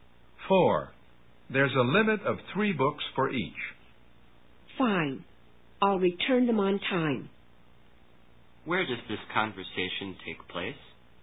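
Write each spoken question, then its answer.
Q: Where does this conversation take place?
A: In a library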